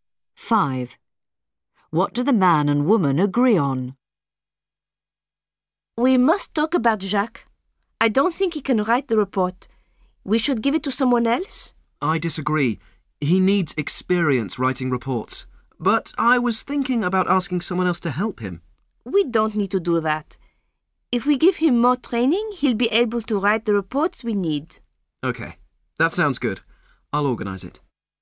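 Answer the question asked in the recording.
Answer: Giving Jacques more training so he can write the reports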